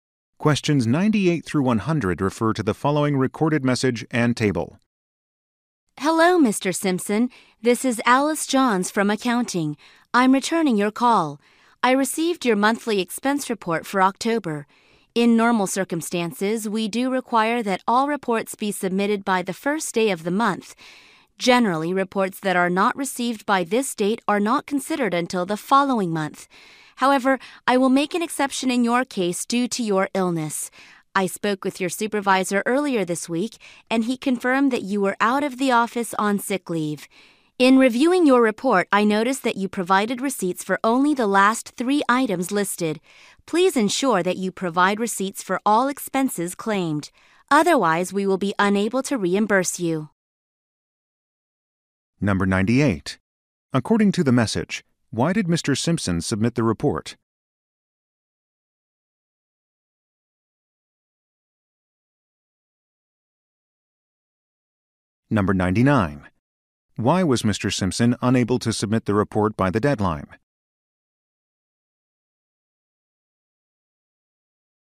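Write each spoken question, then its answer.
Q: Why was Mr. Simpson unable to submit the report by the deadline?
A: He was ill (on sick leave)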